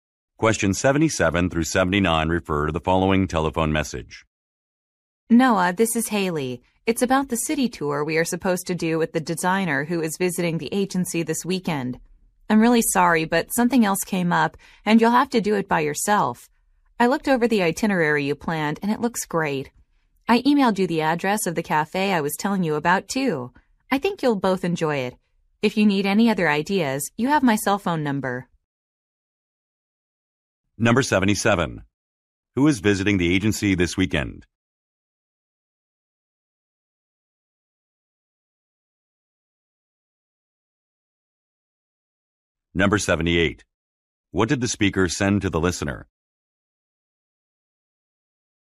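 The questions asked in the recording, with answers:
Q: Who is visiting the agency this weekend?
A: A designer

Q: What did the speaker send to the listener?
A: The address of a cafe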